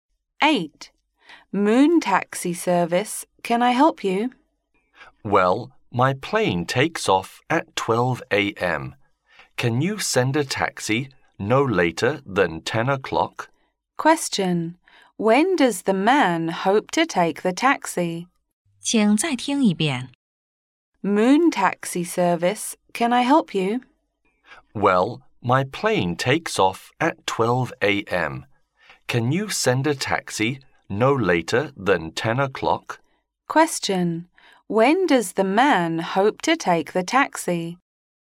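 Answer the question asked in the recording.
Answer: No later than 10 o'clock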